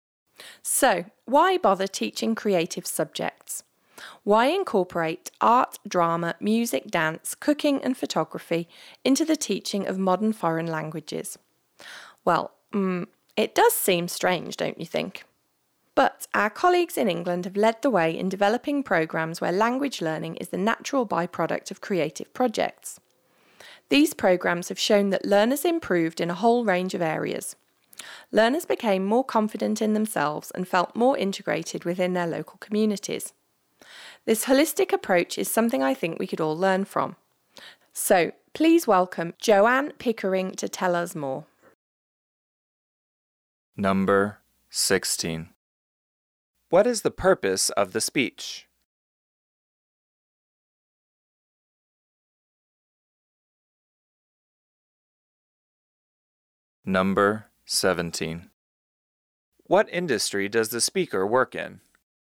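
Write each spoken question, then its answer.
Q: What is the purpose of the speech?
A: To introduce a speaker (Joanne Pickering)

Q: What industry does the speaker work in?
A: Education (language teaching)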